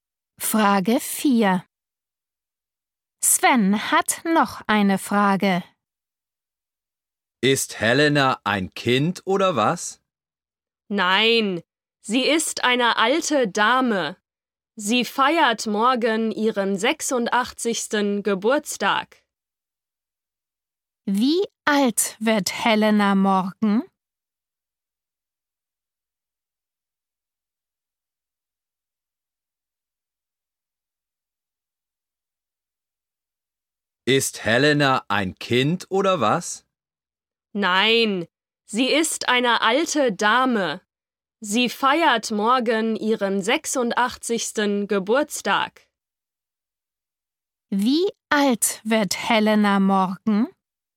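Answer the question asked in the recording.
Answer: 86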